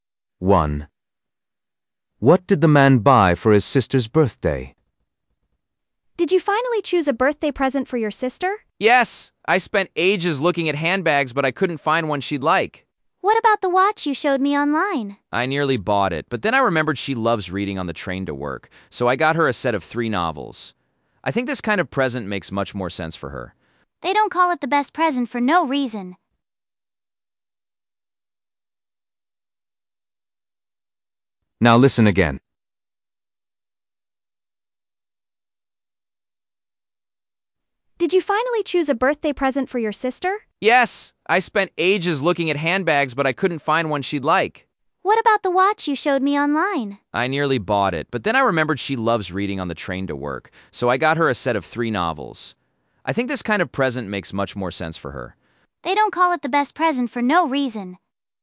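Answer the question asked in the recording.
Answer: a set of 3 novels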